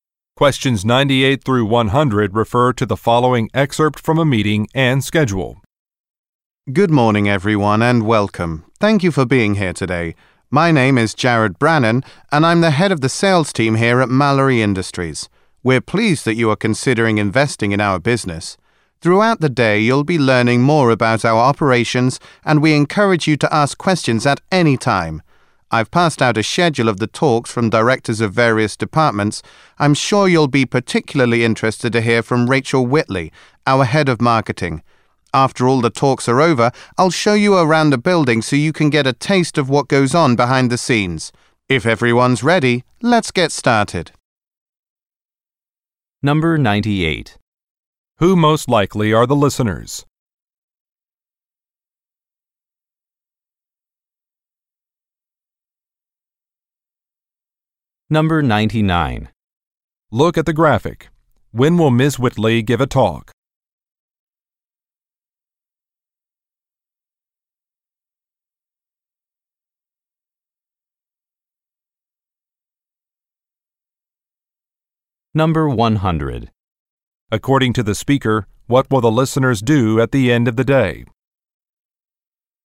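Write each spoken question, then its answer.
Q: Who most likely are the listeners?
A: Possible investors

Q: According to the speaker, what will the listeners do at the end of the day?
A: Take a tour of the building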